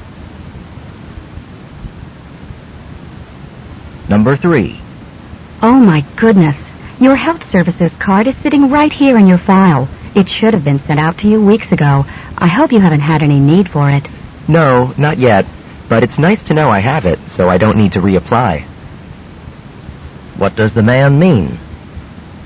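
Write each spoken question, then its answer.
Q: What does the man mean?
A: He hasn't needed the card yet.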